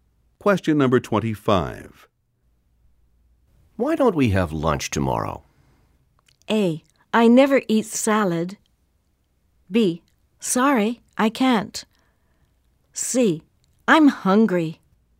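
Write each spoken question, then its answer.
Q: Why don't we have lunch tomorrow?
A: B: Sorry, I can't.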